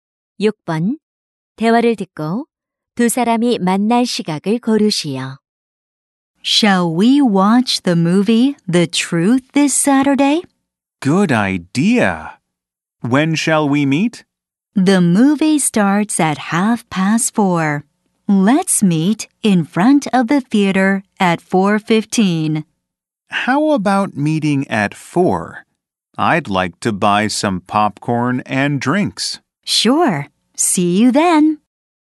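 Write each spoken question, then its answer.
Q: 대화를 듣고 두 사람이 만날 시각을 고르시오.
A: 4시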